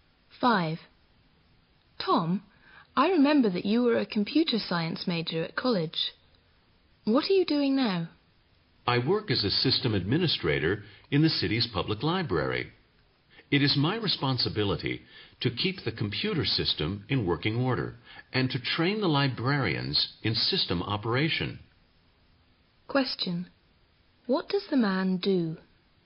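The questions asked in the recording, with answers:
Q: What does the man do?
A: He is a system administrator in the public library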